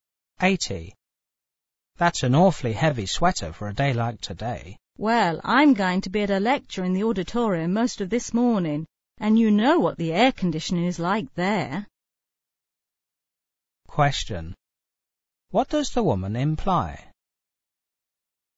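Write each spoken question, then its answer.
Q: What does the woman imply?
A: The auditorium will be cold because of the air conditioning.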